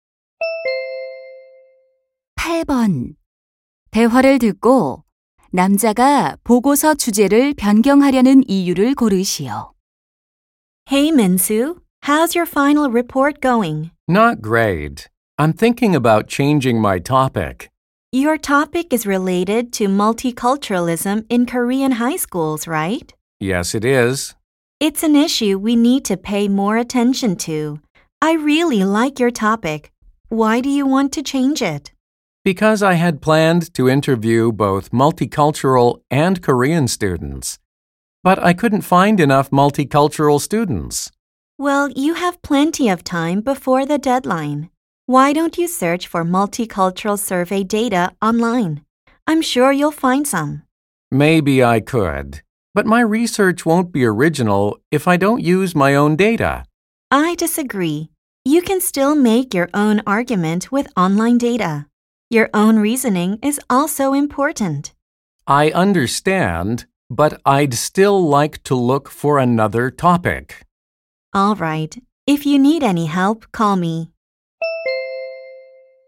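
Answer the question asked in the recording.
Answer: 인터뷰할 다문화 학생을 충분히 찾지 못해서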